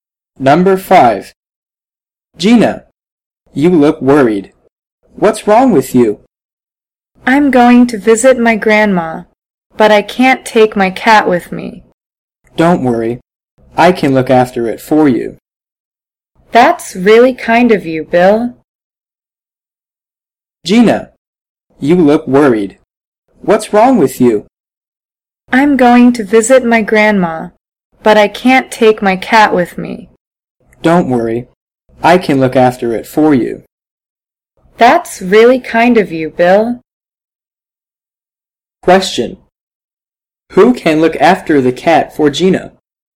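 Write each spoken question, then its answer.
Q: Who can look after the cat for Gina?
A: Bill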